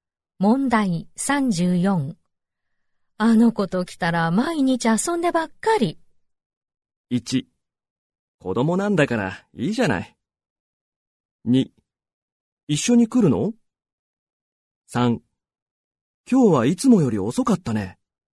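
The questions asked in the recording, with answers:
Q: あの子と来たら毎日遊んでばっかり。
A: 1: 子供なんだからいいじゃない。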